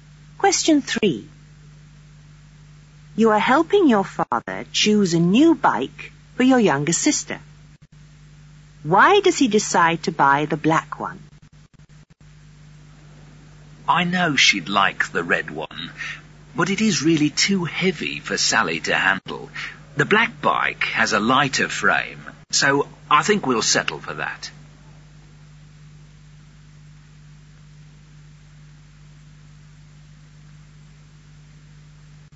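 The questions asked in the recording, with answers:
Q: Why does he decide to buy the black one?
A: It has a lighter frame (the red one is too heavy)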